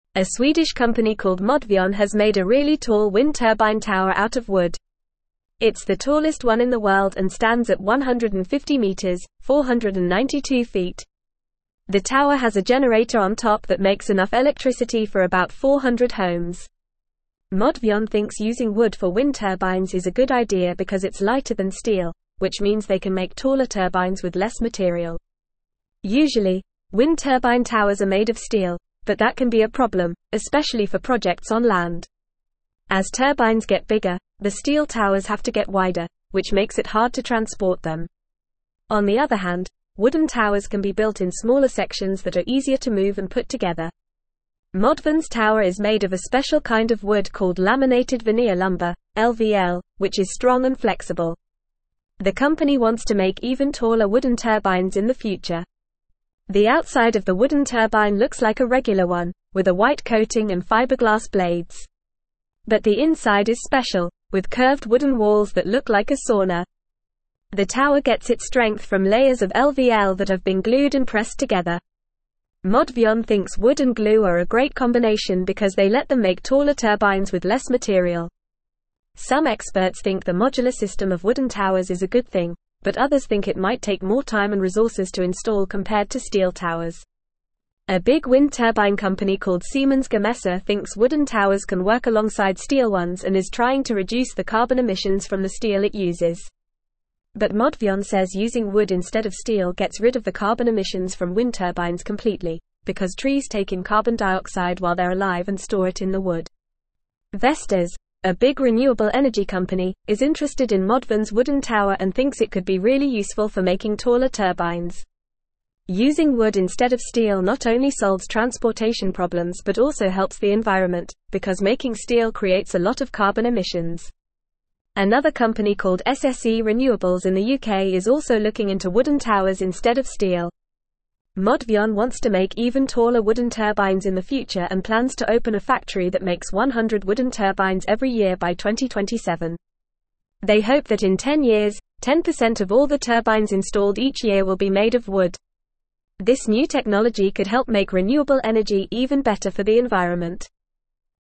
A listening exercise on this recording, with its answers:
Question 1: It's the tallest one in the world and (1)______ at 150 meters (492 feet).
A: stands

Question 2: which means they can make (2)______ turbines with less material.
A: taller

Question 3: but that can be a problem, especially for (3)______ on land.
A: projects

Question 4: On the other hand, (4)______ towers can be built in smaller (5)______ that are easier to move and put together.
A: wooden

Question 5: On the other hand, (4)______ towers can be built in smaller (5)______ that are easier to move and put together.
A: sections

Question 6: The (6)______ of the wooden turbine looks like a regular one, with a white coating and (7)______ blades.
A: outside

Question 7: The (6)______ of the wooden turbine looks like a regular one, with a white coating and (7)______ blades.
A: fiberglass

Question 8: But the inside is special, with (8)______ wooden walls that look like a sauna.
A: curved

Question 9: Some experts think the modular (9)______ of wooden towers is a good thing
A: system

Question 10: A big wind turbine company called Siemens Gamesa (10)______ wooden towers can work alongside steel ones and is trying to reduce the (11)______ emissions from the steel it uses.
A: thinks

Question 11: A big wind turbine company called Siemens Gamesa (10)______ wooden towers can work alongside steel ones and is trying to reduce the (11)______ emissions from the steel it uses.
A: carbon

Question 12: because trees take in carbon dioxide while they're (12)______ and store it in the wood.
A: alive

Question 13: Using wood instead of steel not only (13)______ transportation problems but also helps the environment, because making steel (14)______ a lot of carbon emissions.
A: solves

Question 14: Using wood instead of steel not only (13)______ transportation problems but also helps the environment, because making steel (14)______ a lot of carbon emissions.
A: creates

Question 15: Another company called SSE Renewables in the UK is also looking into wooden (15)______ instead of steel.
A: towers

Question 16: This new technology could help make renewable (16)______ even better for the environment.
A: energy

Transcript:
A Swedish company called Modvion has made a really tall wind turbine tower out of wood. It's the tallest one in the world and stands at 150 meters (492 feet). The tower has a generator on top that makes enough electricity for about 400 homes. Modvion thinks using wood for wind turbines is a good idea because it's lighter than steel, which means they can make taller turbines with less material.
Usually, wind turbine towers are made of steel, but that can be a problem, especially for projects on land. As turbines get bigger, the steel towers have to get wider, which makes it hard to transport them. On the other hand, wooden towers can be built in smaller sections that are easier to move and put together. Modvion's tower is made of a special kind of wood called laminated veneer lumber (LVL), which is strong and flexible. The company wants to make even taller wooden turbines in the future.
The outside of the wooden turbine looks like a regular one, with a white coating and fiberglass blades. But the inside is special, with curved wooden walls that look like a sauna. The tower gets its strength from layers of LVL that have been glued and pressed together. Modvion thinks wood and glue are a great combination because they let them make taller turbines with less material.
Some experts think the modular system of wooden towers is a good thing, but others think it might take more time and resources to install compared to steel towers. A big wind turbine company called Siemens Gamesa thinks wooden towers can work alongside steel ones and is trying to reduce the carbon emissions from the steel it uses. But Modvion says using wood instead of steel gets rid of the carbon emissions from wind turbines completely, because trees take in carbon dioxide while they're alive and store it in the wood.
Vestas, a big renewable energy company, is interested in Modvion's wooden tower and thinks it could be really useful for making taller turbines. Using wood instead of steel not only solves transportation problems but also helps the environment, because making steel creates a lot of carbon emissions. Another company called SSE Renewables in the UK is also looking into wooden towers instead of steel.
Modvion wants to make even taller wooden turbines in the future and plans to open a factory that makes 100 wooden turbines every year by 2027. They hope that in 10 years, 10% of all the turbines installed each year will be made of wood. This new technology could help make renewable energy even better for the environment.